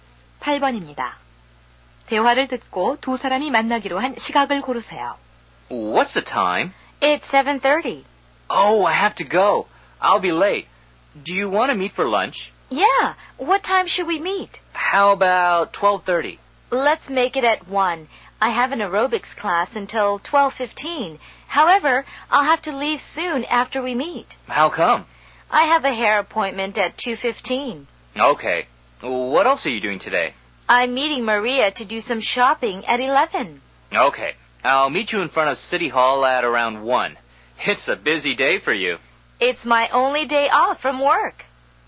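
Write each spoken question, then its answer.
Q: 대화를 듣고 두 사람이 만나기로 한 시각을 고르세요.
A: 1시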